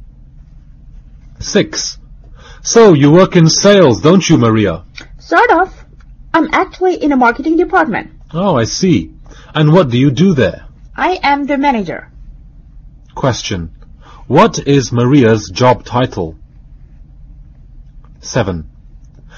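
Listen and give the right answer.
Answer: Marketing manager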